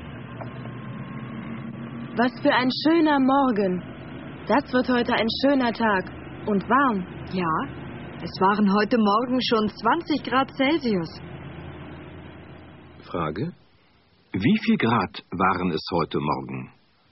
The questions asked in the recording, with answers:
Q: Frage: Wie viel Grad waren es heute Morgen?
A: Heute Morgen waren es 20 Grad.